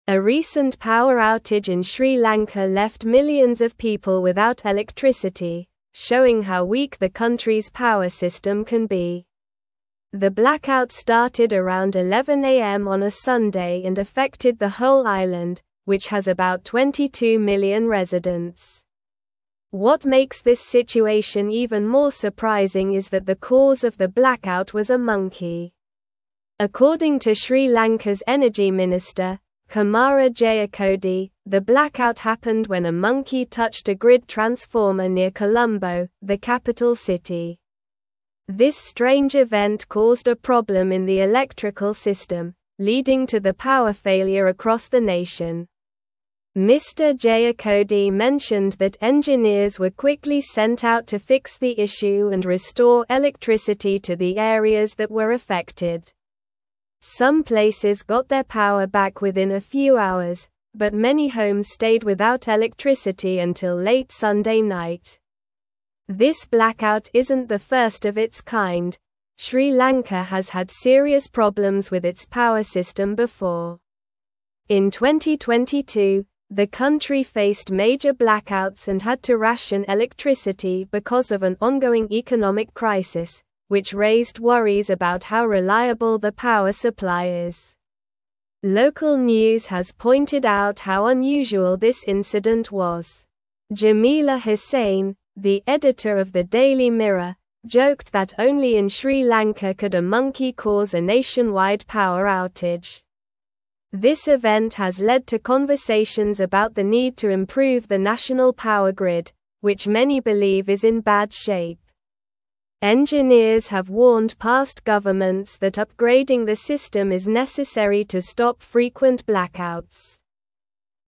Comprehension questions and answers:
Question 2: A recent (1)______ outage in Sri Lanka left (2)______ of people without electricity, showing how weak the country's power system can be.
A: millions

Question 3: (3)______ to Sri Lanka's energy (4)______, Kumara Jayakody, the (5)______ happened when a monkey touched a grid (6)______ near Colombo, the capital city.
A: According

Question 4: (3)______ to Sri Lanka's energy (4)______, Kumara Jayakody, the (5)______ happened when a monkey touched a grid (6)______ near Colombo, the capital city.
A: minister

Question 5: (3)______ to Sri Lanka's energy (4)______, Kumara Jayakody, the (5)______ happened when a monkey touched a grid (6)______ near Colombo, the capital city.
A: blackout

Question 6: (3)______ to Sri Lanka's energy (4)______, Kumara Jayakody, the (5)______ happened when a monkey touched a grid (6)______ near Colombo, the capital city.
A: transformer

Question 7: This strange (7)______ caused a problem in the (8)______ system, leading to the power failure across the nation.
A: event

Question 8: This strange (7)______ caused a problem in the (8)______ system, leading to the power failure across the nation.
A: electrical

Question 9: Some places got their power back within a few hours, but many homes (9)______ without electricity until late Sunday (10)______.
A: stayed

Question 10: Some places got their power back within a few hours, but many homes (9)______ without electricity until late Sunday (10)______.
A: night

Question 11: In 2022, the country faced major blackouts and had to ration electricity because of an ongoing economic crisis, which raised (11)______ about how reliable the power supply is.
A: worries

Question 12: (12)______ news has pointed out how unusual this incident was.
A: Local

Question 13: Jamila Husain, the editor of the Daily (13)______, (14)______ that only in Sri Lanka could a (15)______ cause a nationwide power outage.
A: Mirror

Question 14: Jamila Husain, the editor of the Daily (13)______, (14)______ that only in Sri Lanka could a (15)______ cause a nationwide power outage.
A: joked

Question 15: Jamila Husain, the editor of the Daily (13)______, (14)______ that only in Sri Lanka could a (15)______ cause a nationwide power outage.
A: monkey

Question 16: Engineers have warned past governments that upgrading the system is necessary to stop (16)______ blackouts.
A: frequent

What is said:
A recent power outage in Sri Lanka left millions of people without electricity, showing how weak the country's power system can be. The blackout started around 11 a.m. on a Sunday and affected the whole island, which has about 22 million residents. What makes this situation even more surprising is that the cause of the blackout was a monkey.
According to Sri Lanka's energy minister, Kumara Jayakody, the blackout happened when a monkey touched a grid transformer near Colombo, the capital city. This strange event caused a problem in the electrical system, leading to the power failure across the nation. Mr. Jayakody mentioned that engineers were quickly sent out to fix the issue and restore electricity to the areas that were affected.
Some places got their power back within a few hours, but many homes stayed without electricity until late Sunday night. This blackout isn't the first of its kind; Sri Lanka has had serious problems with its power system before. In 2022, the country faced major blackouts and had to ration electricity because of an ongoing economic crisis, which raised worries about how reliable the power supply is.
Local news has pointed out how unusual this incident was. Jamila Husain, the editor of the Daily Mirror, joked that only in Sri Lanka could a monkey cause a nationwide power outage. This event has led to conversations about the need to improve the national power grid, which many believe is in bad shape. Engineers have warned past governments that upgrading the system is necessary to stop frequent blackouts.

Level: Level 3